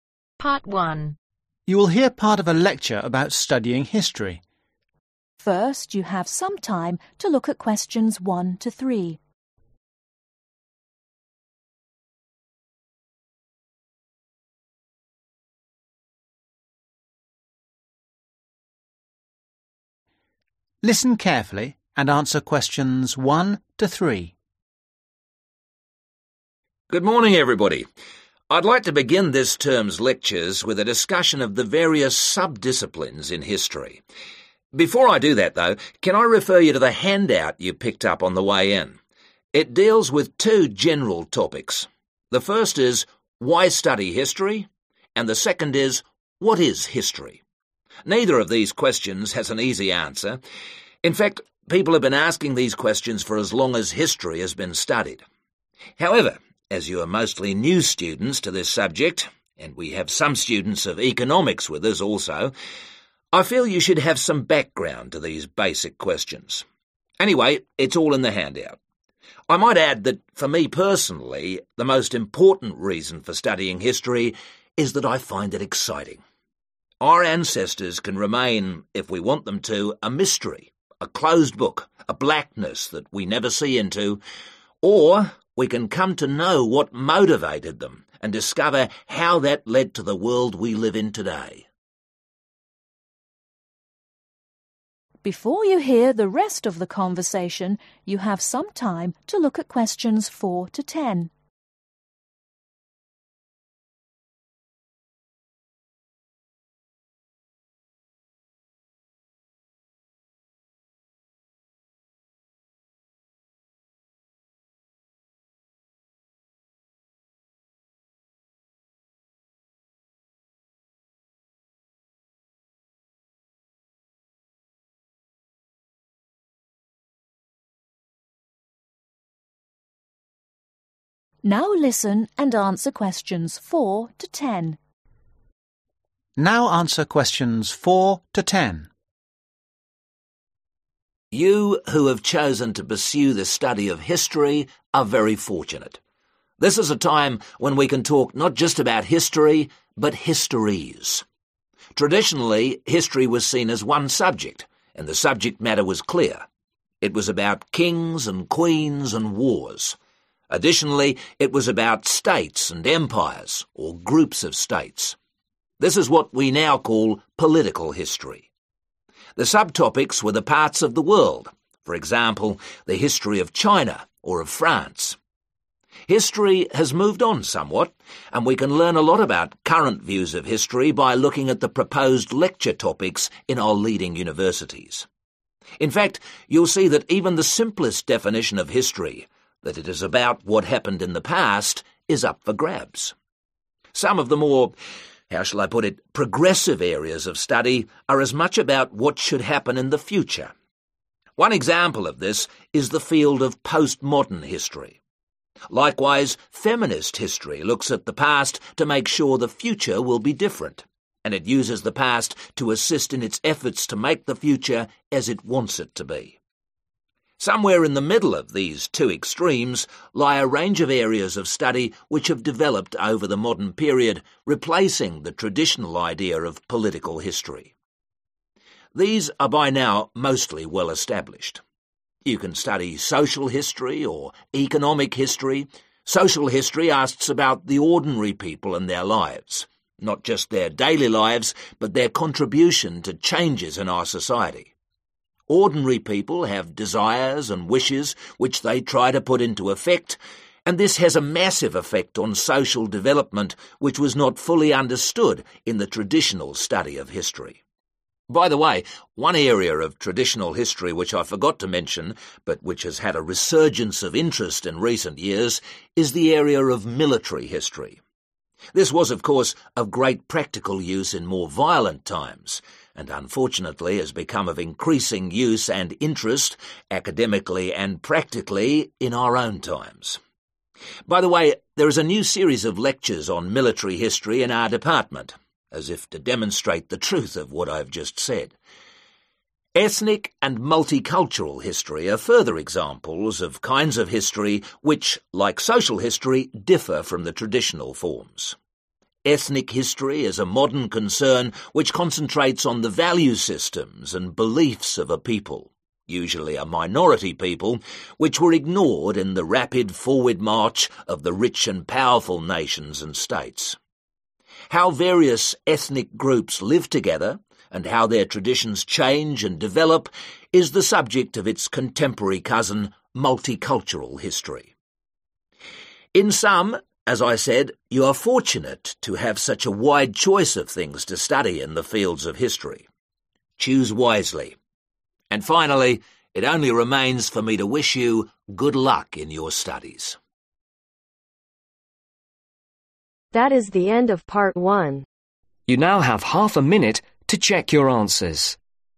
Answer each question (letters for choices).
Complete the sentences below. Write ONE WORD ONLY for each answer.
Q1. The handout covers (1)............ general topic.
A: Two

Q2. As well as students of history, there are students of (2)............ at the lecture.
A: Economics

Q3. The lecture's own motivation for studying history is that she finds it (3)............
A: Exciting

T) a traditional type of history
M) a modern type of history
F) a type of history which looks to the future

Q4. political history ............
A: T

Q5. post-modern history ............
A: F

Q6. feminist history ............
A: F

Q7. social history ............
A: M

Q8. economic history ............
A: M

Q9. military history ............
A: T

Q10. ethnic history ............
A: M